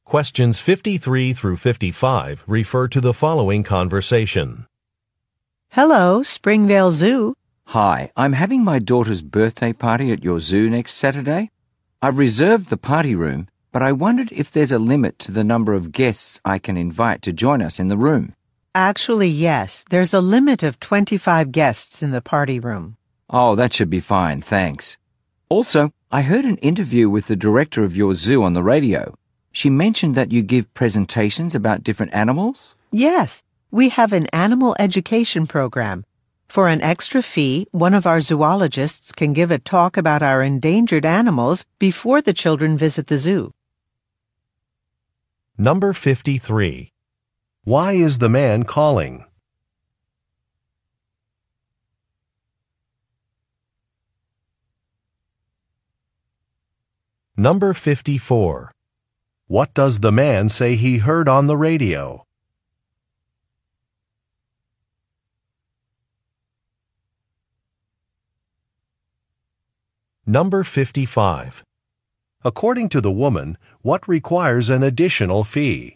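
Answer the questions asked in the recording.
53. To ask about the guest limit for a party room
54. An interview with the zoo director
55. A zoologist's talk about endangered animals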